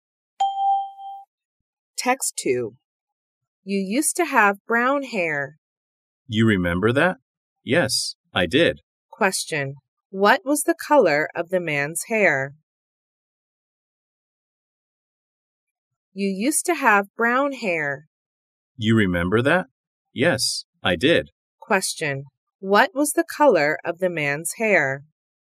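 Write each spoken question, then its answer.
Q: What was the color of the man's hair?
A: Brown.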